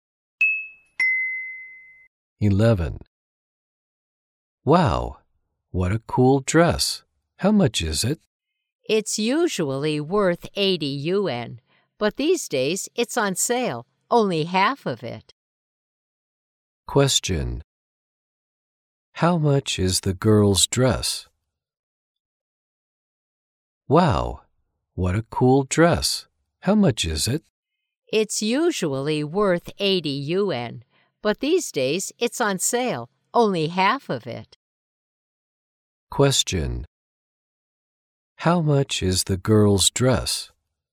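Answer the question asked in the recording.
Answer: 40 yuan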